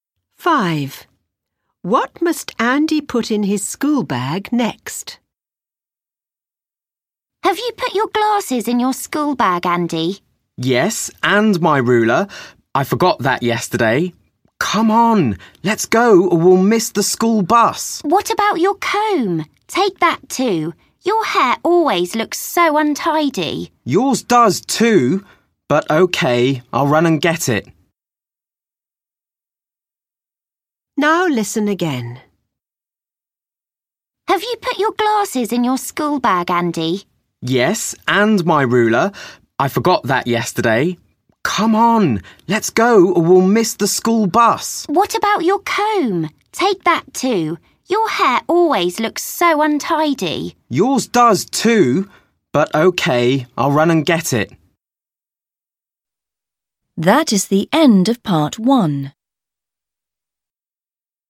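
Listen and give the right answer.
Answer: His comb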